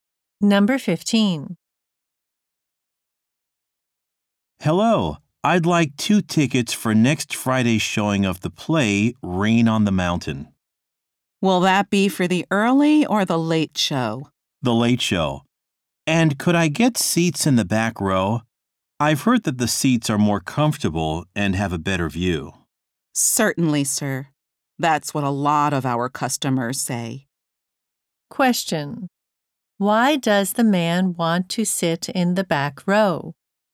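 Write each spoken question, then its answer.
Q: Why does the man want to sit in the back row?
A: The seats are more comfortable and have a better view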